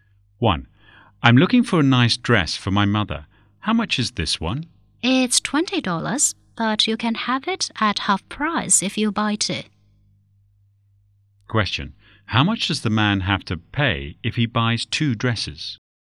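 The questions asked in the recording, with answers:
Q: How much does the man have to pay if he buys two dresses?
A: $20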